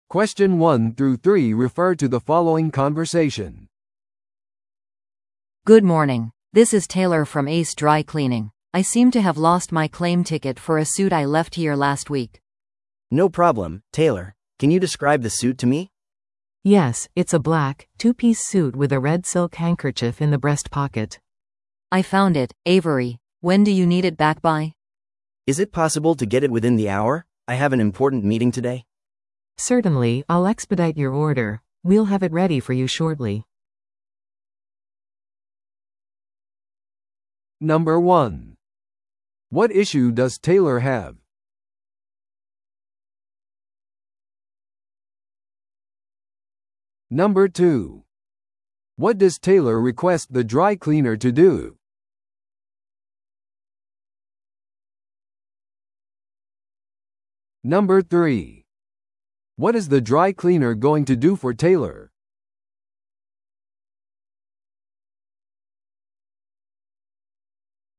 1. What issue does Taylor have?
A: テイラーは受け取り票を紛失してしまった。

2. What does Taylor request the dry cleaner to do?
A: 1時間以内にスーツを返す。

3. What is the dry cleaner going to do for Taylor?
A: すぐにテイラーのスーツを用意する。

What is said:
A: Good morning, this is Taylor from Ace Dry Cleaning. I seem to have lost my claim ticket for a suit I left here last week.
B: No problem, Taylor. Can you describe the suit to me?
C: Yes, it's a black, two-piece suit with a red silk handkerchief in the breast pocket.
A: I found it, Avery. When do you need it back by?
B: Is it possible to get it within the hour? I have an important meeting today.
C: Certainly, I'll expedite your order. We'll have it ready for you shortly.